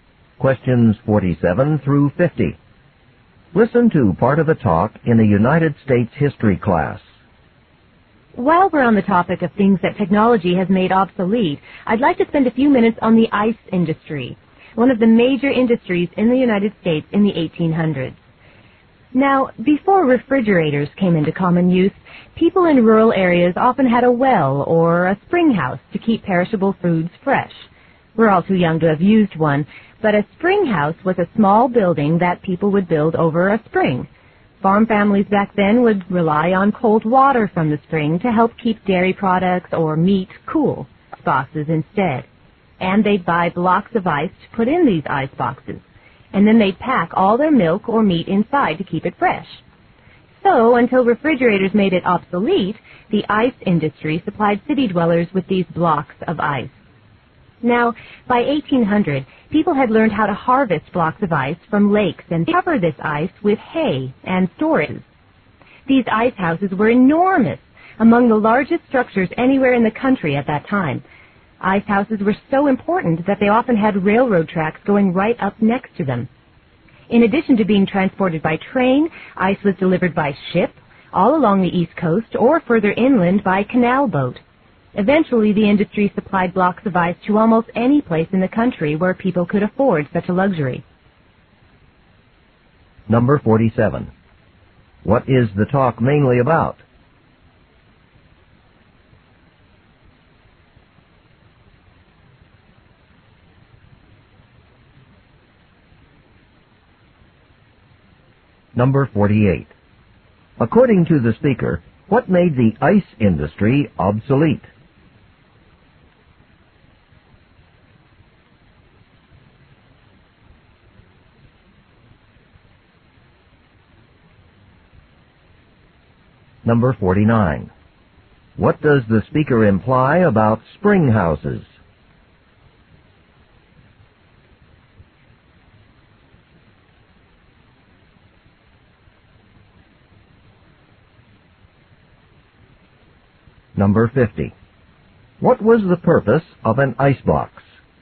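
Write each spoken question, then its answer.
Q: What is the talk mainly about?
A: The ice industry in the 1800s.

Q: According to the speaker, what made the ice industry obsolete?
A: Refrigerators.

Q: What was the purpose of an icebox?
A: To keep food such as milk and meat fresh.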